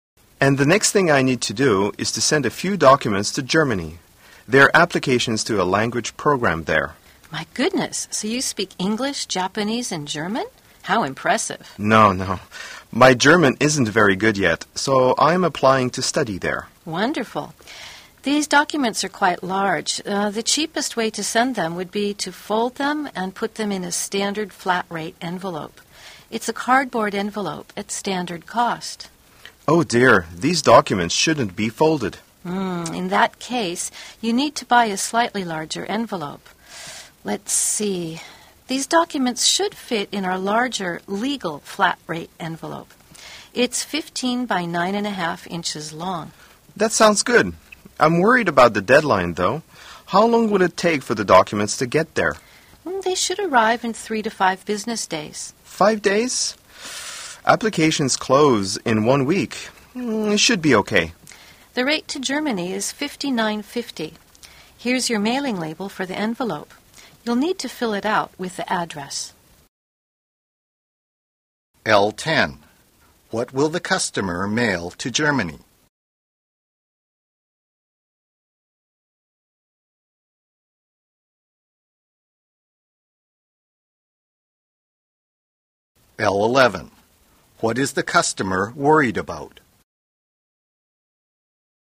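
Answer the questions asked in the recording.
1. Application documents for a language program
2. The application deadline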